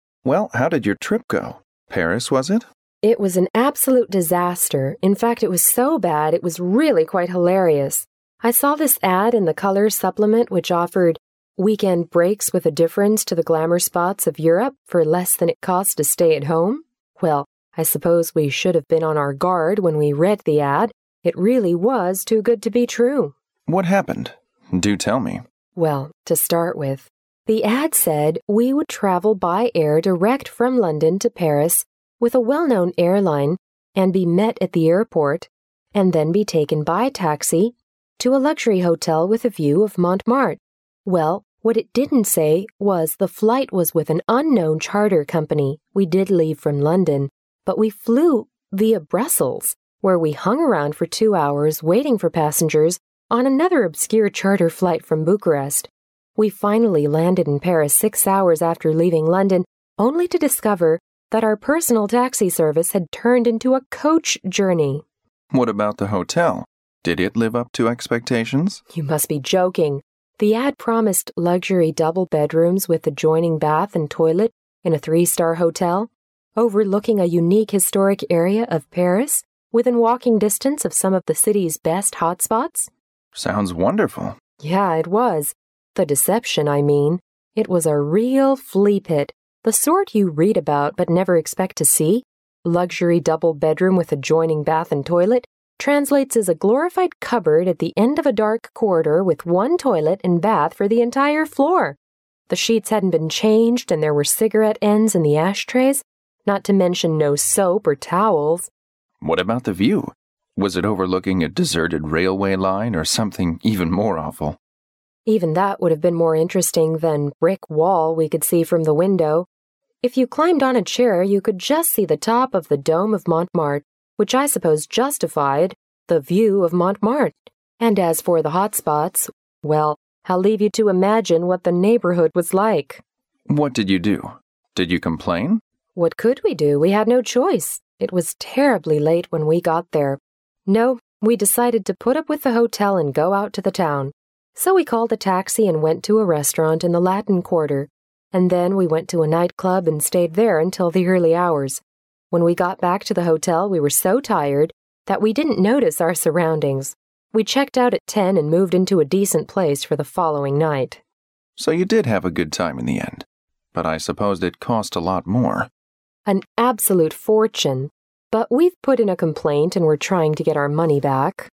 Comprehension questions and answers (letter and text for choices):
Directions:Each conversation will be read only once. At the end of each conversation, there will be a one-minute pause. During the pause, read the four choices marked A, B, C and D, and decide which is the best answer or complete the following sentences with one word according to what you hear.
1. Where did the woman get the advertisement?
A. From newspaper.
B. From the television.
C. From the Internet.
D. From the radio.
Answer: A. From newspaper.

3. What did the woman say about the hotel she was put into?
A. It was really luxurious and comfortable.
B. It was far from what she had expected.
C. It didn't provide breakfast as promised.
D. It has a nice overlooking view.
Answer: B. It was far from what she had expected.

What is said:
M: Well, how did your trip go? Paris, was it?
W: It was an absolute disaster. In fact, it was so bad, it was really quite hilarious. I saw this ad in the colour supplement which offered "weekend breaks with a difference to the glamour spots of Europe for less than it costs to stay at home". Well, I suppose we should have been on our guard when we read the ad. It really was too good to be true.
M: What happened? Do tell me.
W: Well, to start with, the ad said we would travel by air direct from London to Pairs with a well-known airline and be met at the airport and then be taken by taxi to a luxury hotel with a view of Montmartre. Well, what it didn't say was the flight was with an unknown charter company. We did leave from London, but we flew via Brussels where we hung around for two hours waiting for passengers on another obscure charter flight from Bucharest. We finally landed in Paris six hours after leaving London, only to discover that our personal taxi service had turned into a coach journey.
M: What about the hotel? Did it live up to expectations?
W: You must be joking! The ad promised luxury double bedrooms with adjoining bath and toilet in a three- star hotel overlooking a unique historic area of Paris, within walking distance of some of the city's best hot spots.
M: Sounds wonderful.
W: Yeah, it was. The deception, I mean. It was a real fleapit. The sort you read about but never expect to see. "Luxury double bedroom with adjoining bath and toilet" translates as a glorified cupboard at the end of a dark corridor with one toilet and bath for the entire floor. The sheets hadn't been changed and there were cigarette ends in the ashtrays. Not to mention no soap or towels.
Was it overlooking a deserted railway line or something even more awful?
W: Even that would have been more interesting than brick wall we could see from the window, if you climbed on a chair, you could just see the top of the dome of Montomartre—which I suppose justified the "view of Montmartre". And as for the hot spots, well, I'll leave you to imagine what the neighborhood was like!
M: What did you do? Did you complain?
W: What could we do? We had no choice. It was terribly late when we got there. No, we decided to put up with the hotel and go out to the town. So we called a taxi and went to a restaurant in the Latin Quarter. And then we went to a nightclub and stayed there until the early hours. When we got back to the hotel, we were so tired that we didn't notice our surroundings. We checked out at ten and moved into a decent place for the following night.
M: So you did have a good time in the end. But I suppose it cost a lot more.
W: An absolute fortune. But we've put in a complaint and we're trying to get our money back.